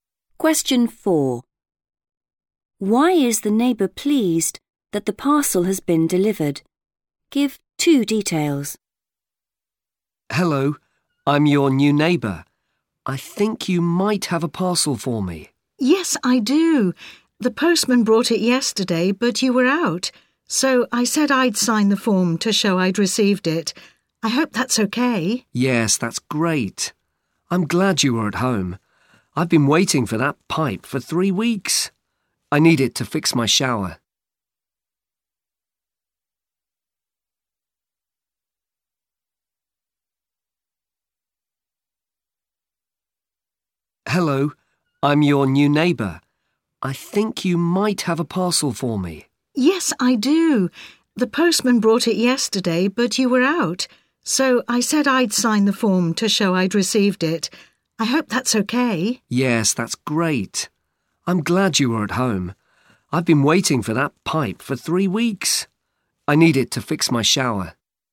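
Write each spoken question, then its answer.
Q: Why is the neighbour pleased that the parcel has been delivered? Give two details.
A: he has waited three weeks for the pipe; he needs it to fix his shower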